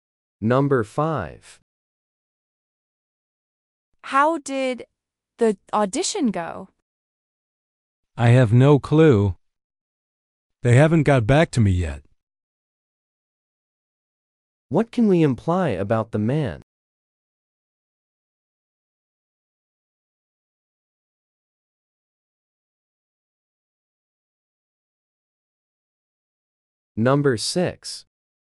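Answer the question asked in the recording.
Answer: He doesn't know the result of his audition yet.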